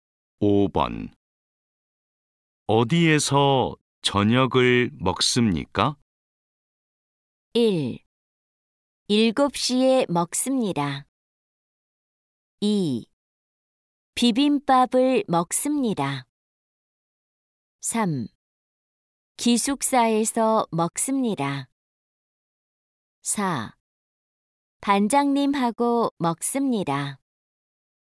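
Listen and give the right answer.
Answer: 3: 기숙사에서 먹습니다.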